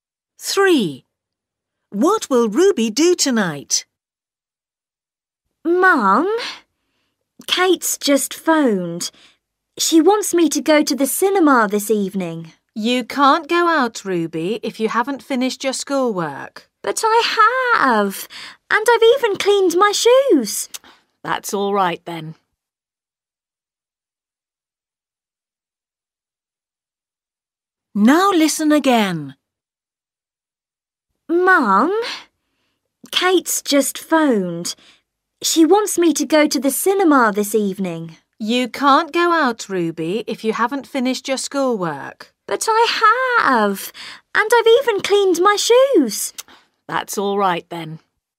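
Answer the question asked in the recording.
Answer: go to the cinema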